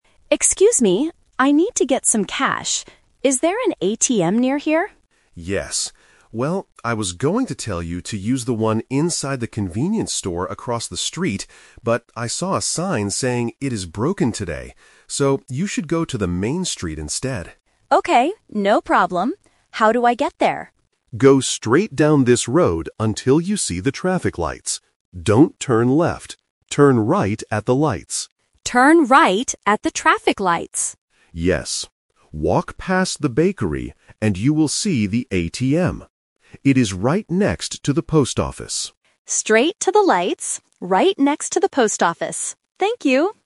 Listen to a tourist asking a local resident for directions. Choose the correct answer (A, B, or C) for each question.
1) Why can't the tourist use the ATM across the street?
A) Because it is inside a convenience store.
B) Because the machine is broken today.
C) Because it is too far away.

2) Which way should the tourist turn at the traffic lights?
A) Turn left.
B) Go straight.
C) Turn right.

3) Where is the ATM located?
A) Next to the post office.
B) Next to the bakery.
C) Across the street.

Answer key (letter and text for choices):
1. B) Because the machine is broken today.
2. C) Turn right.
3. A) Next to the post office.

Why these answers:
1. The local says clearly, "I saw a sign saying it is broken today." The Trap: Option (A) is a trap. The ATM is indeed inside a convenience store, but that is not the reason the tourist cannot use it. Option (C) is incorrect because the local actually says it is "across the street" (which means it is very close).
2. The local gives the instruction: "Turn right at the lights." The Trap: Option (A) is explicitly mentioned but as a negative instruction ("Don't turn left"). Option (B) is what the tourist must do before reaching the lights.
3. The final destination is stated clearly: "It is right next to the post office." The Trap: Option (B) mentions the bakery, but that is just a landmark the tourist must "walk past". Option (C) refers to the location of the broken ATM.

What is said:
Tourist: Excuse me, I need to get some cash. Is there an ATM near here?
Local: Yes. Well, I was going to tell you to use the one inside the convenience store across the street, but I saw a sign saying it is broken today. So, you should go to the main street instead.
Tourist: Okay, no problem. How do I get there?
Local: Go straight down this road until you see the traffic lights. Don't turn left.
Tourist: Turn right at the traffic lights.
Local: Yes. Walk past the bakery, and you will see the ATM. It is right next to the post office.